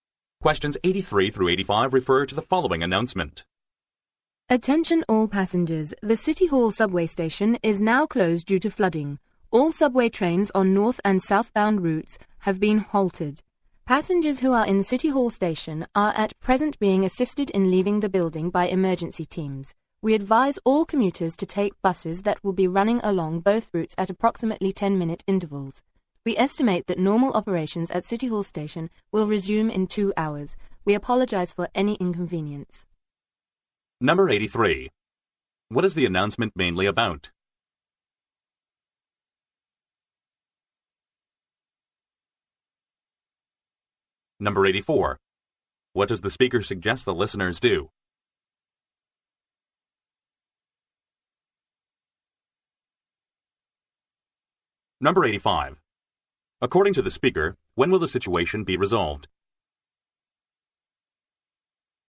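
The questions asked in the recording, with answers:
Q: What is the announcement mainly about?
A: The closure of City Hall subway station due to flooding

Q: What does the speaker suggest the listeners do?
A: Take buses

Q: According to the speaker, when will the situation be resolved?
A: In 2 hours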